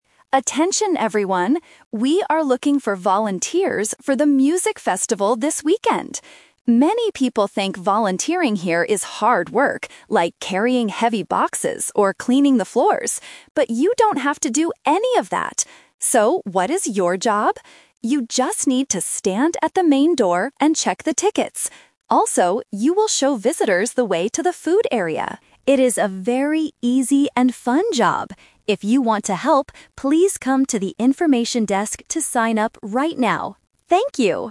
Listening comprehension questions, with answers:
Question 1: What do some people think volunteers have to do?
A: Clean the floors

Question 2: What is the actual job of the volunteers?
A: Stand at the door and check tickets

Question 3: Where should people go if they want to volunteer?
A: To the information desk

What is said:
Organizer: Attention everyone. We are looking for volunteers for the music festival this weekend. Many people think volunteering here is hard work, like carrying heavy boxes or cleaning the floors. But you don't have to do any of that! So, what is your job? You just need to stand at the main door and check the tickets. Also, you will show visitors the way to the food area. It is a very easy and fun job. If you want to help, please come to the information desk to sign up right now. Thank you!

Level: A2